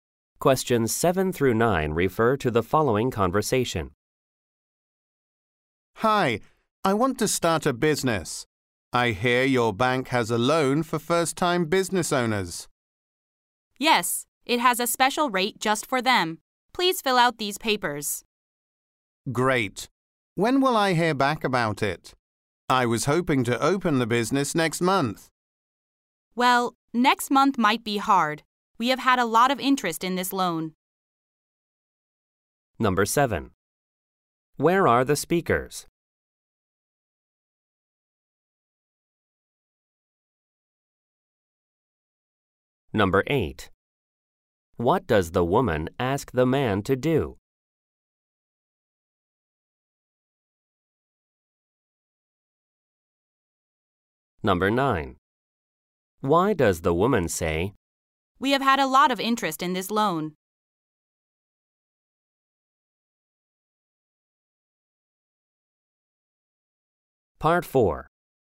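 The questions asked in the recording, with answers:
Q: Where are the speakers?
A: At a bank

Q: What does the woman ask the man to do?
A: Fill out some papers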